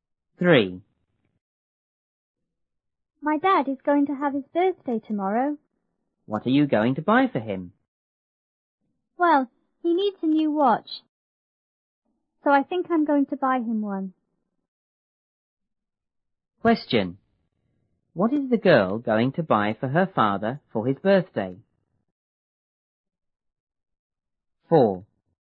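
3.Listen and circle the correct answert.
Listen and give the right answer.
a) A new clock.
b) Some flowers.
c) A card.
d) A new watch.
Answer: d) A new watch.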